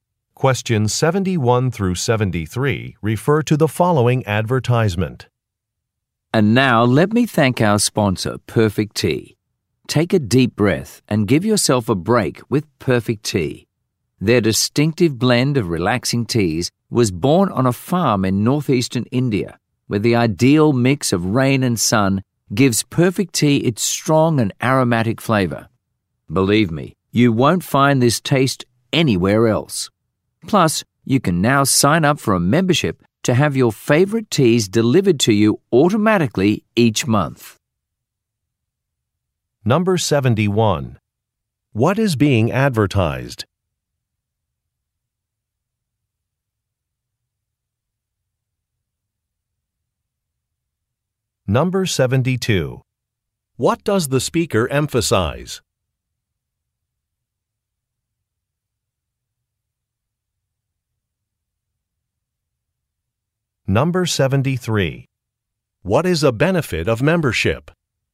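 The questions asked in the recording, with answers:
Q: What is being advertised?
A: A tea brand (Perfect Tea)

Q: What does the speaker emphasize?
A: Its unique taste

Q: What is a benefit of membership?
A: Automatic monthly delivery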